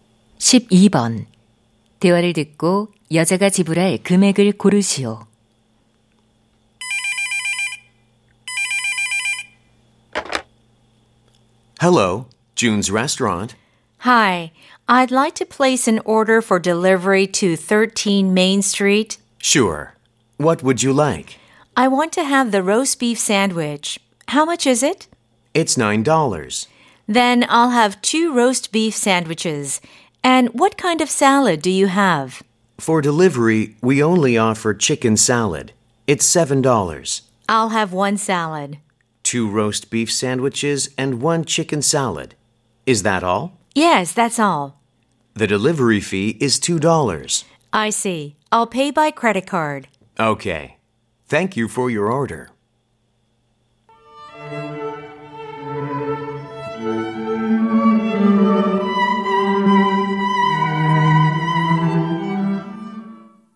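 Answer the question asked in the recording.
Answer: 27달러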